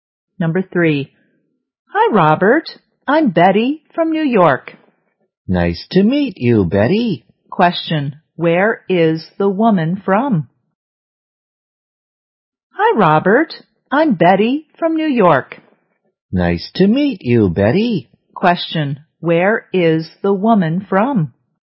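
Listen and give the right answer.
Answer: New York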